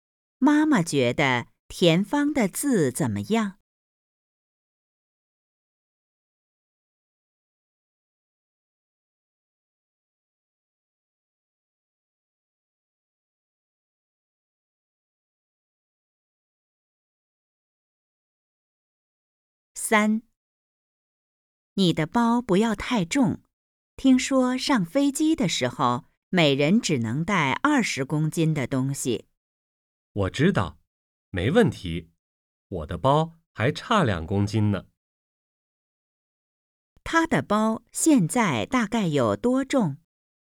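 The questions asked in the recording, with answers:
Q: 他的包现在大概有多重?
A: 18公斤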